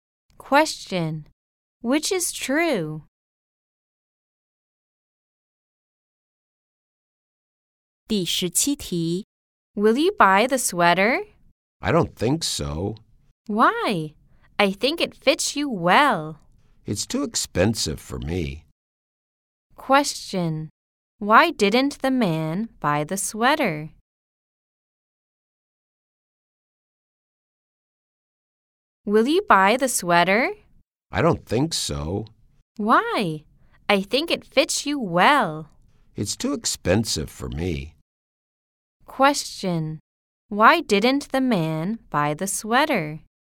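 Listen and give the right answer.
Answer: It was too expensive for him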